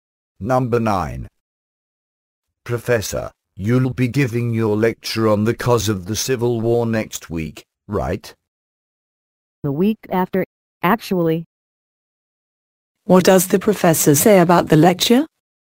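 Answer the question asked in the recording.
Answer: It will be given the week after next week.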